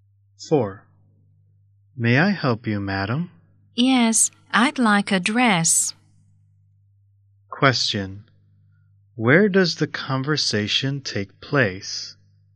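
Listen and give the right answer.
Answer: In a clothes shop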